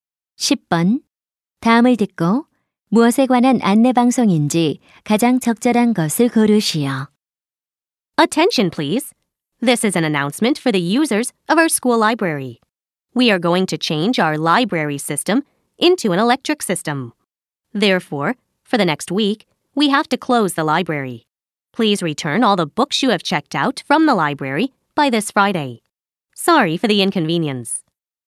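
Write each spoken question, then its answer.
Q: 다음을 듣고 무엇에 관한 안내 방송인지 가장 적절한 것을 고르시오.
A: 시스템 변경으로 인한 학교 도서관 휴관 및 도서 반납 안내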